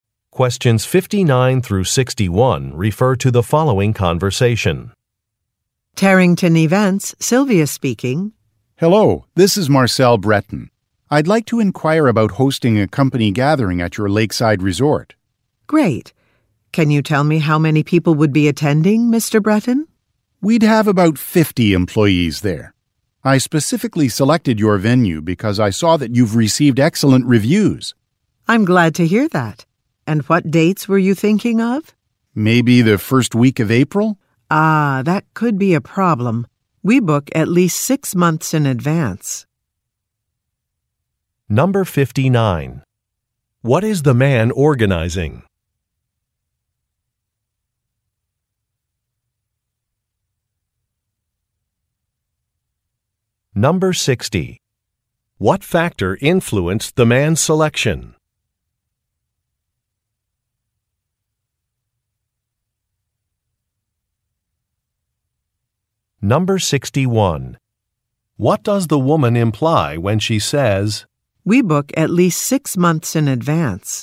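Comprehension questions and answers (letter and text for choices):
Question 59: What is the man organizing?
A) A client meeting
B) A trade show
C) An awards banquet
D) A company outing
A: D) A company outing

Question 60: What factor influenced the man's selection?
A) Affordability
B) Proximity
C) Positive reviews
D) Catering options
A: C) Positive reviews

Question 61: What does the woman imply when she says, "We book at least six months in advance"?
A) A colleague is mistaken about a date.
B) A request might not be accommodated.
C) A decision needs to be made soon.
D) A cancellation will not be possible.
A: B) A request might not be accommodated.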